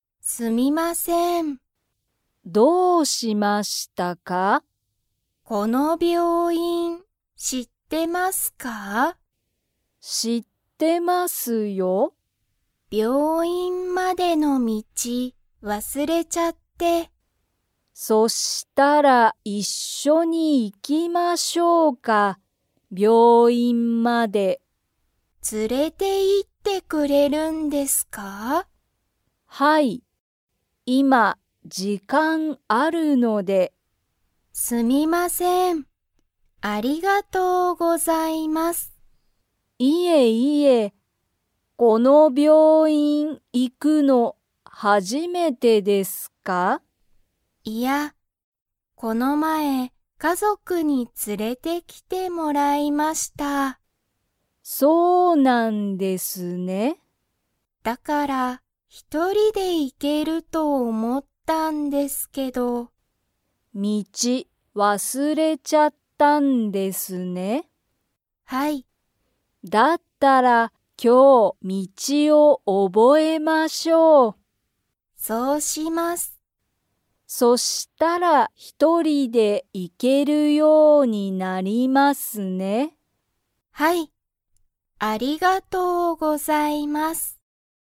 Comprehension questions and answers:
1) 小林(こばやし)さんは今(いま)、____がある。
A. 病院(びょういん)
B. 道(みち)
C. 家族(かぞく)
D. 時間(じかん)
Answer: 時間(じかん)

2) 佐藤(さとう)さんは、その病院(びょういん)に行(い)くのが初(はじ)めてですか?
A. はい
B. いいえ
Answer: いいえ

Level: Level 2

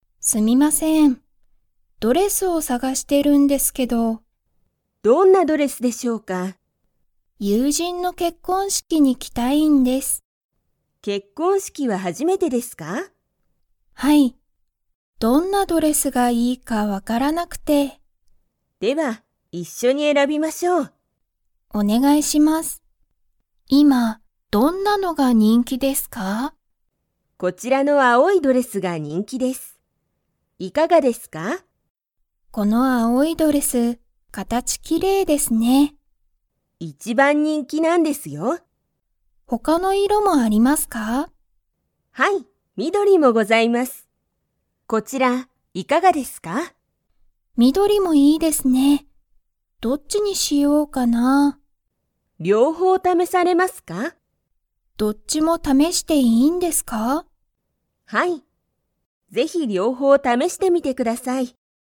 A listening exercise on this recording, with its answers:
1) まゆみは結婚式けっこんしきに行いくのが 。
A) 初はじめてだ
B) 初はじめてじゃない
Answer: 初はじめてだ

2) まゆみは何色なにいろのドレスを試ためしてみますか?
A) 赤あかいドレス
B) 黄色きいろいドレス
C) 青あおいドレスと緑みどりのドレス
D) 青あおいドレスと赤あかいドレス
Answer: 青あおいドレスと緑みどりのドレス

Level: Level 4

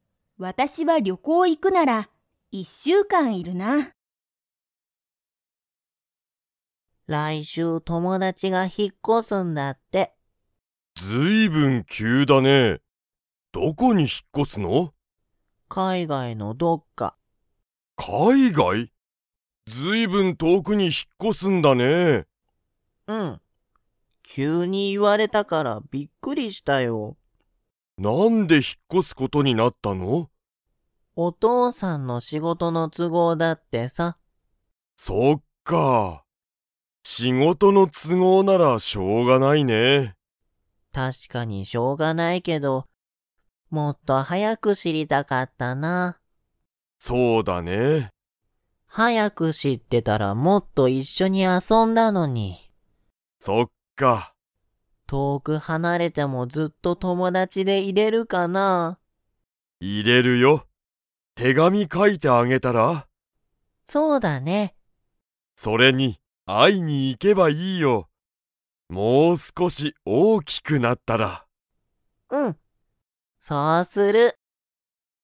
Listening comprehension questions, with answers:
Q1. 来週らいしゅう、誰だれが引ひっ越こしますか?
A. お父とうさん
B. お母かあさん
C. ただしの友達ともだち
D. ただしの先生せんせい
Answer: ただしの友達ともだち

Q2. ただしは、大おおきくなったら友達ともだちに 。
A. 会あいに行いく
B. 会あいに行いかない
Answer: 会あいに行いく

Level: Level 4

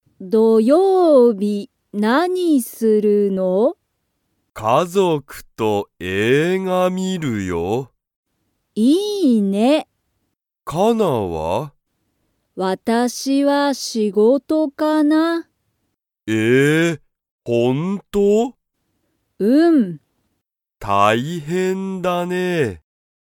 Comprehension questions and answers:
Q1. 土曜日(どようび)、ケンは、____と映画(えいが)を観(み)る。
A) ケンの友達(ともだち)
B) カナの友達(ともだち)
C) ケンの家族(かぞく)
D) カナの家族(かぞく)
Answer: ケンの家族(かぞく)

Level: Level 1

